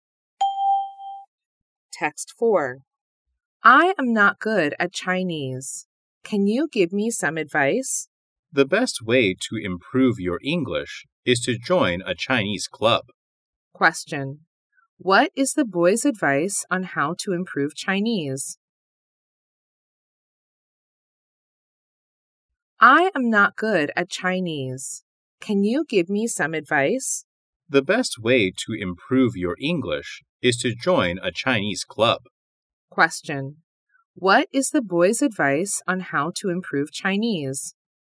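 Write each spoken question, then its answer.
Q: What is the boy's advice on how to improve Chinese?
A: Join a Chinese club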